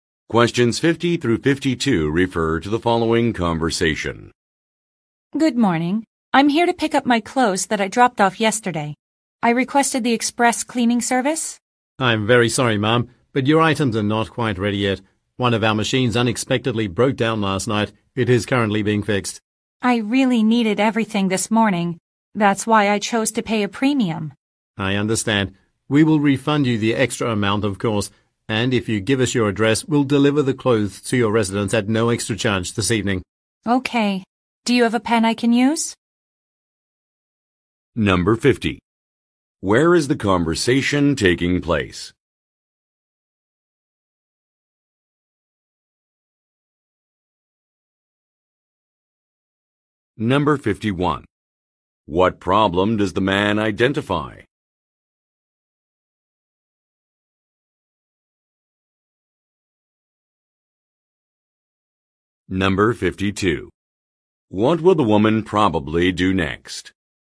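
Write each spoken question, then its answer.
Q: Where is the conversation taking place?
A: At a dry cleaner

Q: What problem does the man identify?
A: A machine broke down

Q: What will the woman probably do next?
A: Write down her address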